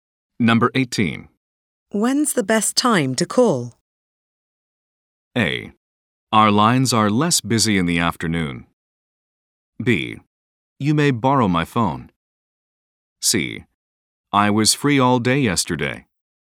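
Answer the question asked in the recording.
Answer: A: Our lines are less busy in the afternoon.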